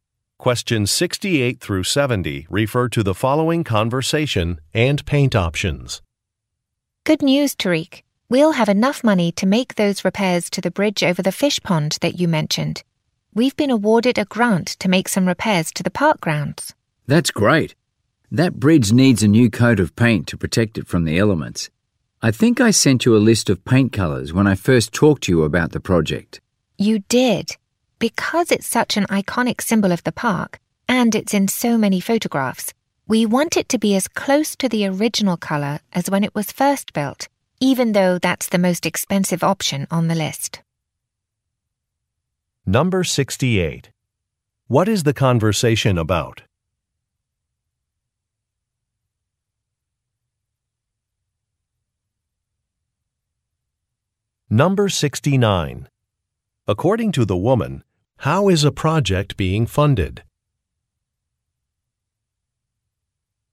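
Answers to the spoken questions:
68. Repairing and painting a park bridge
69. By a grant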